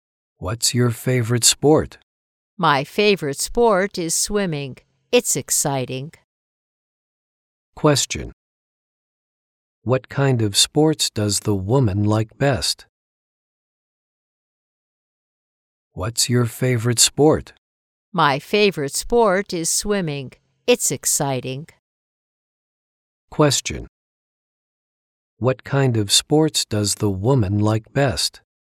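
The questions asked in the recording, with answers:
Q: What kind of sports does the woman like best?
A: Swimming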